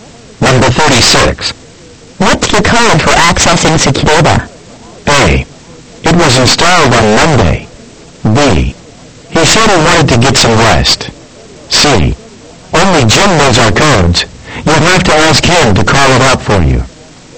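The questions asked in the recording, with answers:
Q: What's the code for accessing Secureba?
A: C: Only Jim knows our codes. You'll have to ask him to call it up for you.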